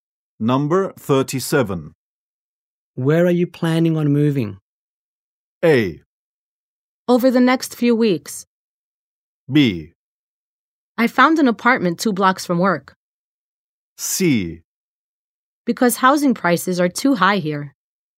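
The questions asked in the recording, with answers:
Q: Where are you planning on moving?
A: B: I found an apartment 2 blocks from work.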